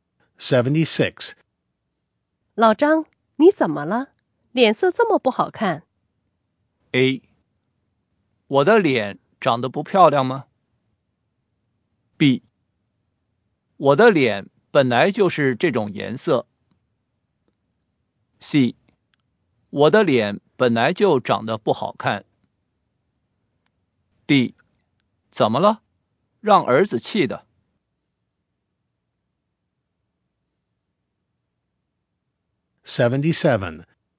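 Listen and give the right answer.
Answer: D: 怎么了?让儿子气的。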